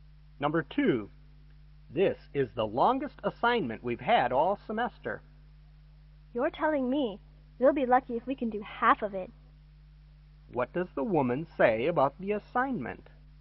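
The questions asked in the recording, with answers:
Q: What does the woman say about the assignment?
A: It's very long, and they may finish only half of it.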